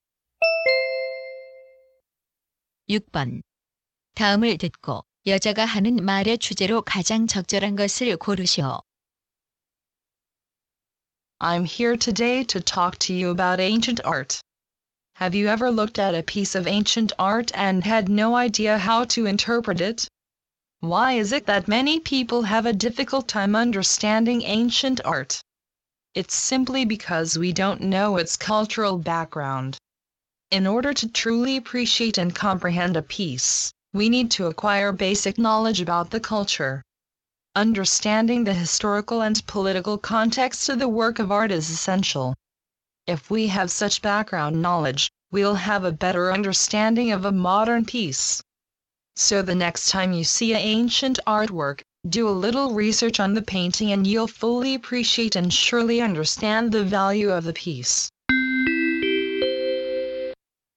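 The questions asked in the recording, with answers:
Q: 다음을 듣고 여자가 하는 말의 주제로 가장 적절한 것을 고르시오.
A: 고대 미술을 이해하려면 문화적 배경 지식이 필요하다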